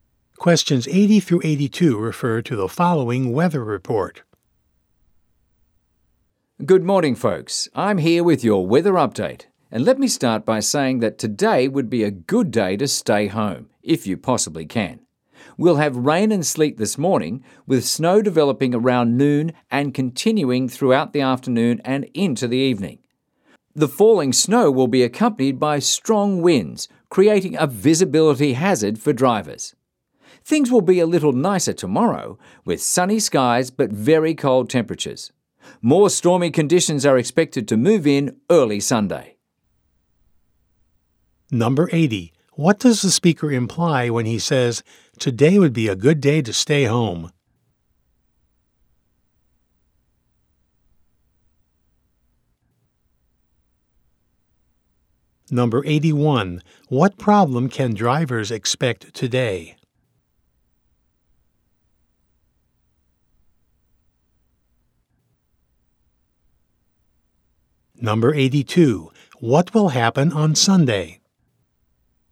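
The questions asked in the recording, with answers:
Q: What does the speaker imply when he says, "Today would be a good day to stay home"?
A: The weather will be bad today

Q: What problem can drivers expect today?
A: Poor visibility from snow and strong winds

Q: What will happen on Sunday?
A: More stormy weather will come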